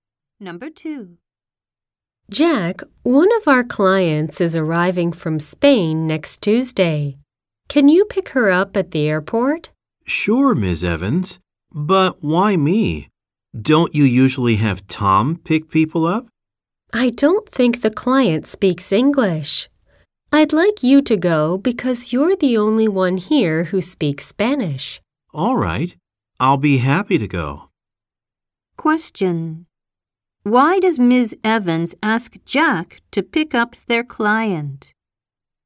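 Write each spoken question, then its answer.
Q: Why does Ms. Evans ask Jack to pick up their client?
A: He is the only one there who speaks Spanish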